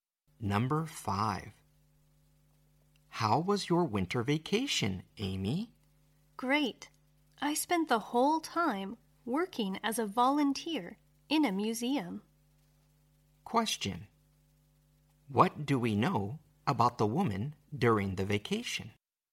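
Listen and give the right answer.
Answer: She worked as a volunteer in a museum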